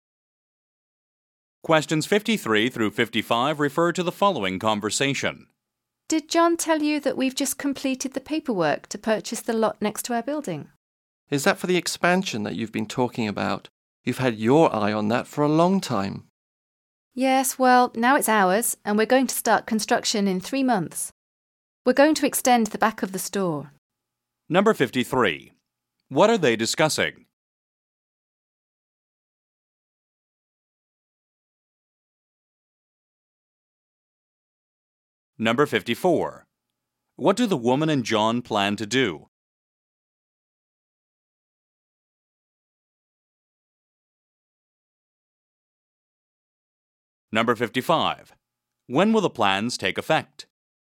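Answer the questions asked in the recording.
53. Buying the lot next door to expand
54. Extend the back of the store
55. In three months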